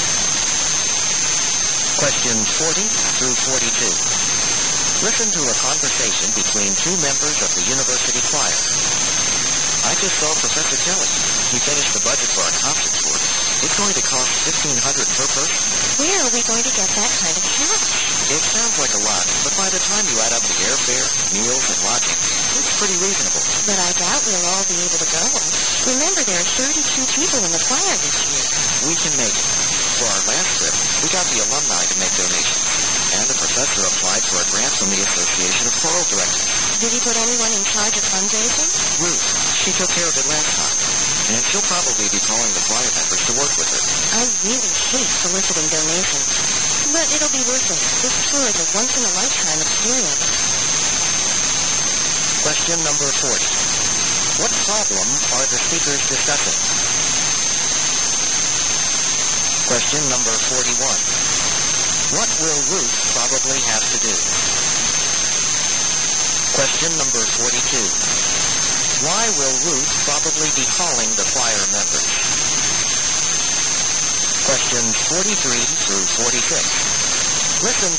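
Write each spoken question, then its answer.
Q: What problem are the speakers discussing?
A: How to pay for the choir's concert tour

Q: What will Ruth probably have to do?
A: Organize the fundraising

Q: Why will Ruth probably be calling the choir members?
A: To ask them to help her get donations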